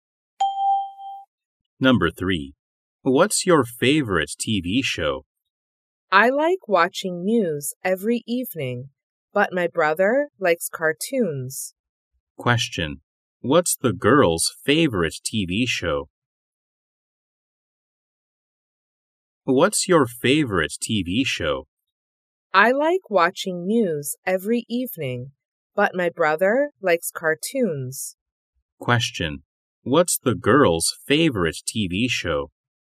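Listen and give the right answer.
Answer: News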